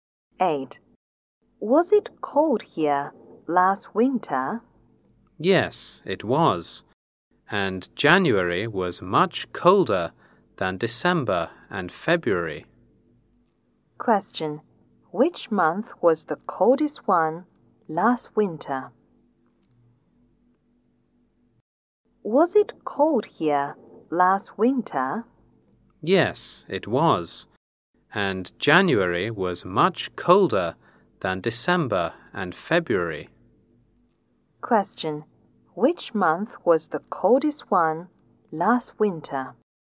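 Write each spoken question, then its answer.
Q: Which month was the coldest one last winter?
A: January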